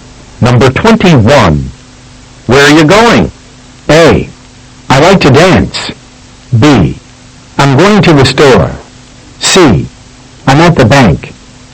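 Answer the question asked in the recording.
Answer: B: I'm going to the store.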